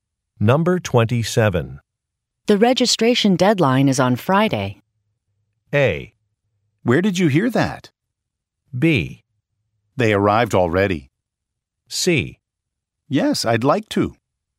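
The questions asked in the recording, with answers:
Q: The registration deadline is on Friday.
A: A: Where did you hear that?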